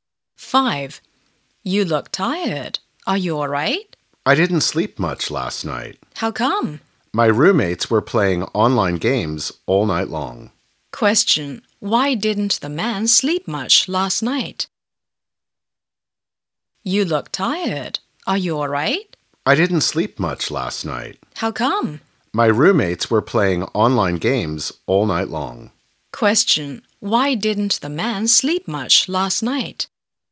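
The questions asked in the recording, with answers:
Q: Why didn't the man sleep much last night?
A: His roommates were playing online games all night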